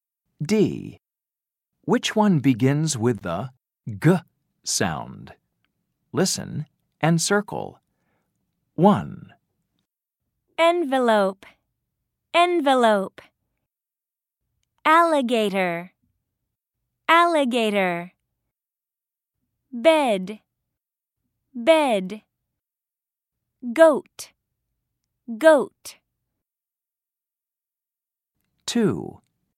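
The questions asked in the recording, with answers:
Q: Which one begins with the G sound?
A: Goat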